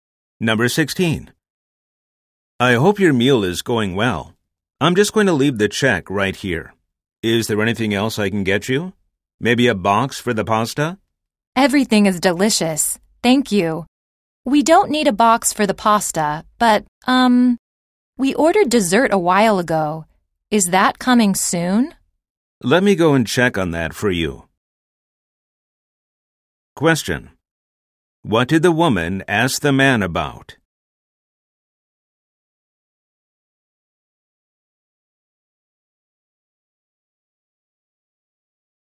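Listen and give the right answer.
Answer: The dessert they ordered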